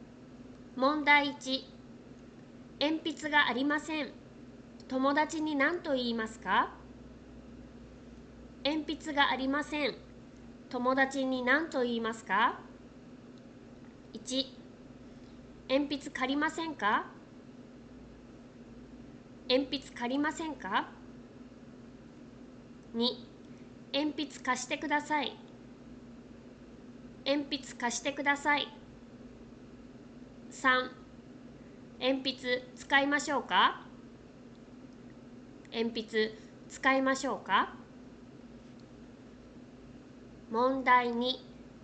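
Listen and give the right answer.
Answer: 2: 鉛筆貸してください。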